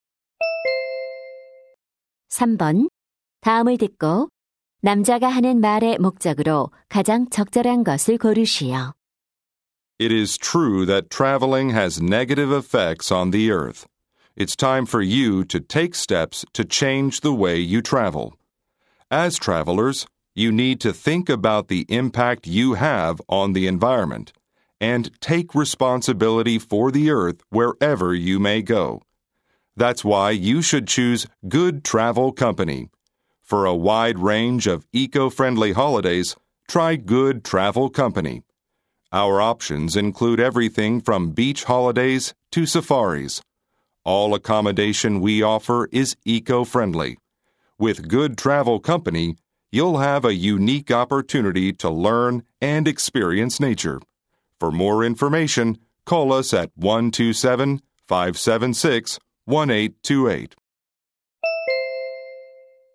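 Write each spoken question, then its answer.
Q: 다음을 듣고 남자가 하는 말의 목적으로 가장 적절한 것을 고르시오.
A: 친환경 여행사(Good Travel Company)를 광고하려고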